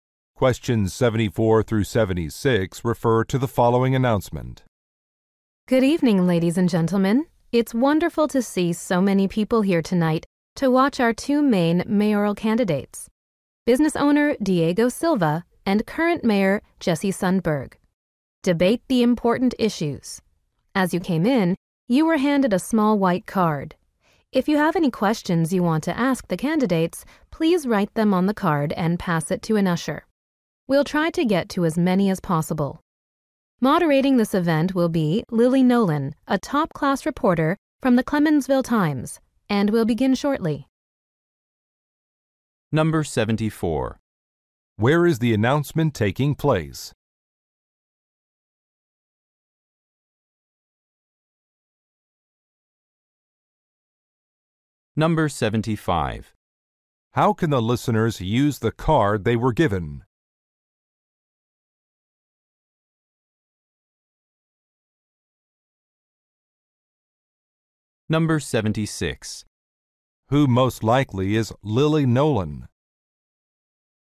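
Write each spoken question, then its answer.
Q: Where is the announcement taking place?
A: At a mayoral debate

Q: How can the listeners use the card they were given?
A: To write questions for the candidates

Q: Who most likely is Lily Nolan?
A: A reporter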